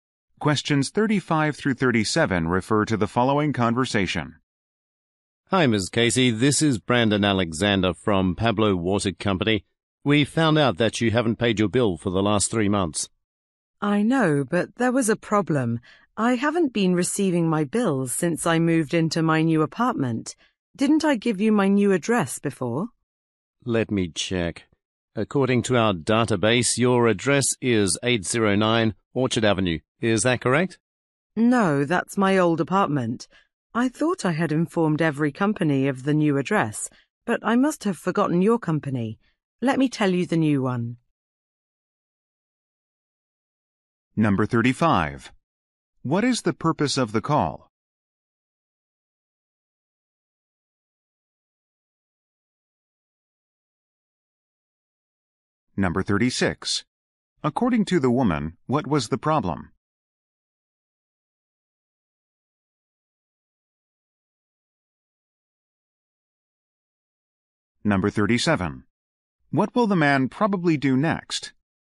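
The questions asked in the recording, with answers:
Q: What is the purpose of the call?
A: To tell her she hasn't paid her bill for 3 months

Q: According to the woman, what was the problem?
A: She hasn't received her bills since moving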